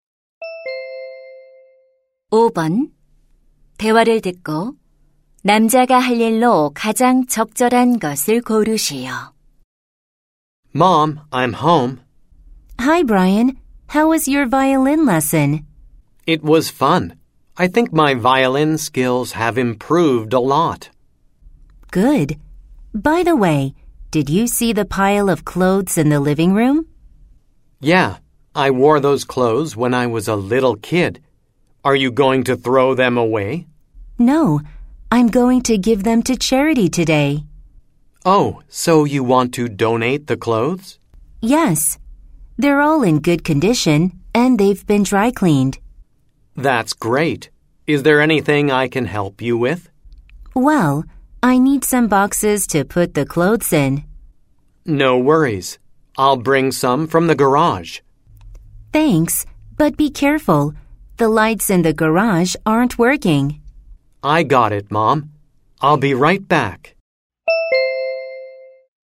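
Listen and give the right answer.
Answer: 차고에서 상자 가져오기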